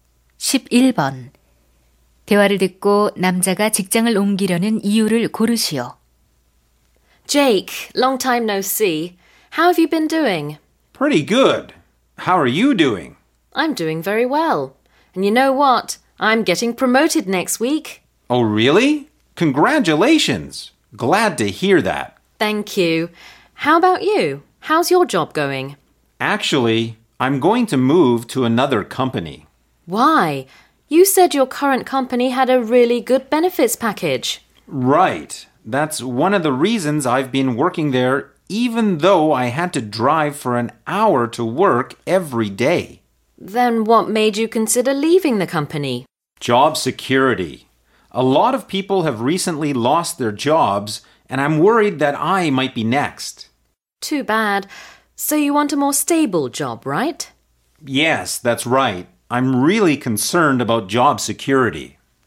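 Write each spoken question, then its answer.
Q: 대화를 듣고 남자가 직장을 옮기려는 이유를 고르시오.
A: 고용 안정성이 걱정되어서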